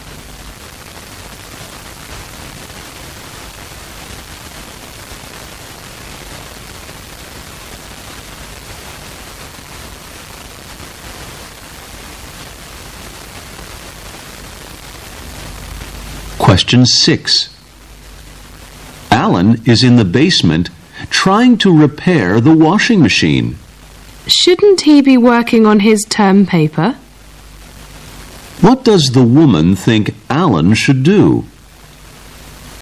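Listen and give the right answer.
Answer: Work on his term paper.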